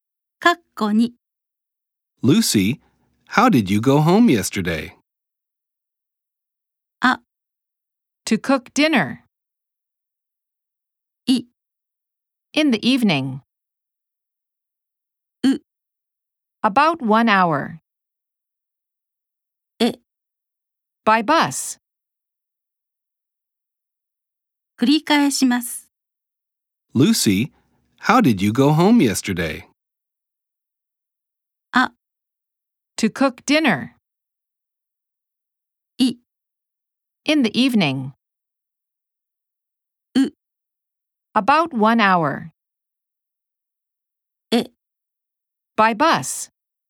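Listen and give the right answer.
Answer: え: By bus.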